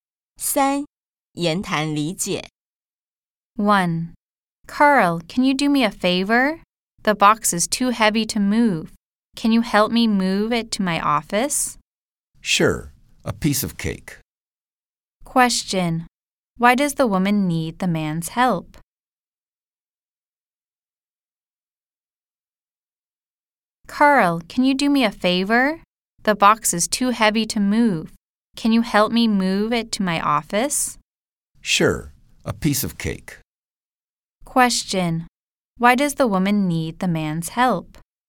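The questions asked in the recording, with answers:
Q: why does the woman need the man's help?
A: The box is too heavy for her to move.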